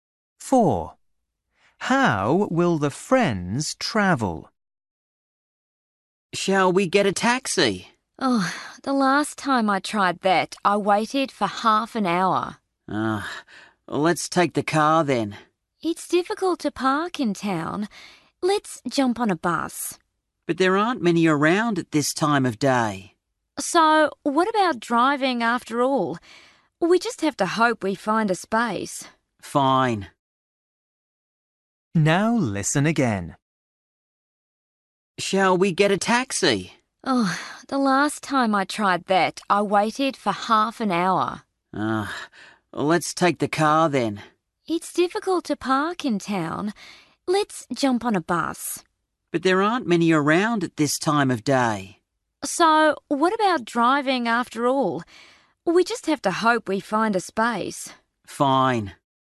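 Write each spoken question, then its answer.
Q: How will the friends travel?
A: by car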